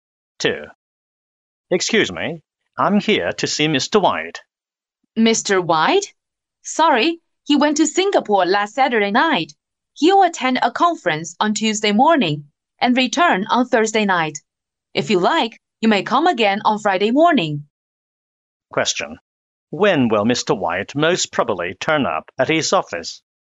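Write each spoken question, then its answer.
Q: When will Mr. White most probably turn up at his office?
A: On Friday morning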